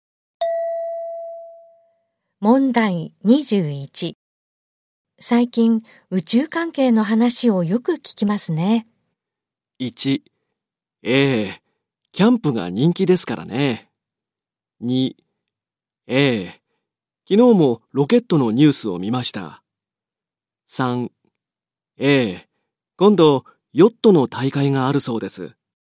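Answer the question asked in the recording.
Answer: 2: ええ、昨日もロケットのニュースを見ました。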